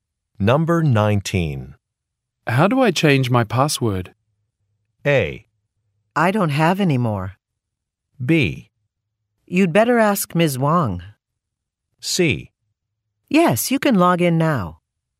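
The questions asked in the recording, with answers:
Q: How do I change my password?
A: B: You'd better ask Ms. Wong.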